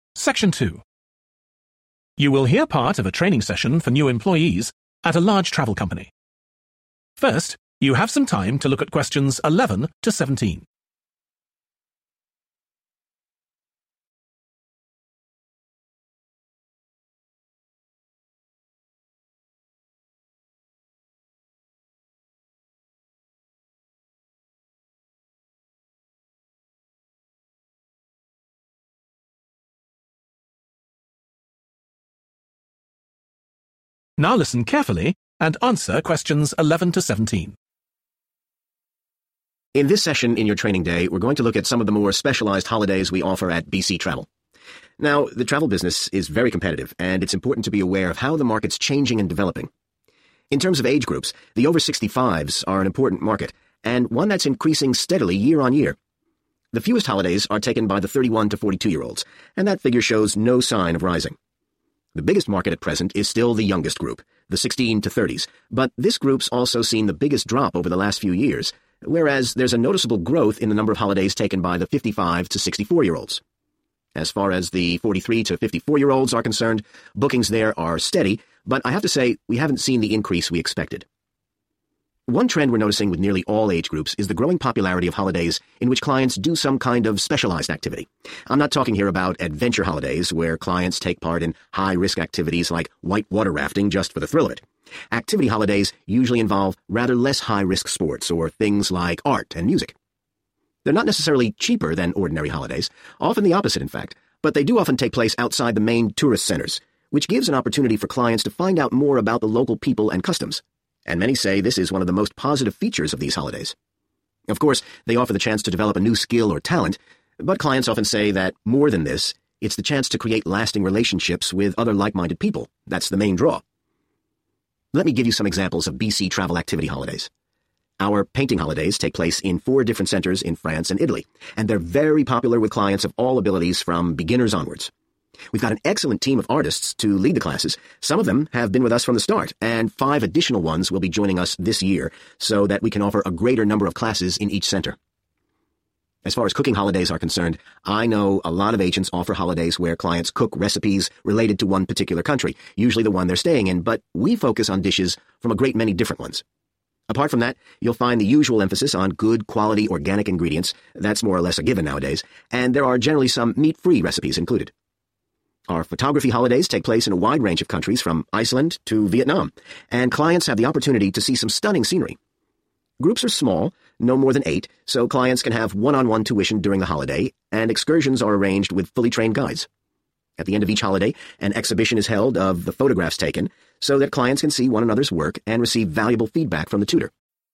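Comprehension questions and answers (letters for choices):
Choose TWO letters, A-E.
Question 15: How does BC Travel plan to expand the painting holidays?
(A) by adding to the number of locations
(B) by increasing the range of levels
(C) by employing more teachers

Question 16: Why are BC Travel's cooking holidays unusual?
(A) They only use organic foods.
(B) They have an international focus.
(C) They mainly involve vegetarian dishes.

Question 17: What does the speaker say about the photography holidays?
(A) Clients receive individual tuition.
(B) The tutors are also trained guides.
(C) Advice is given on selling photographs.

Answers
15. C
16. B
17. A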